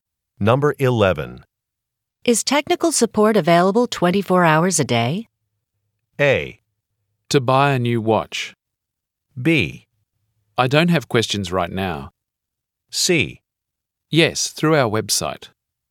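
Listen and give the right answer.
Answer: C: Yes, through our website.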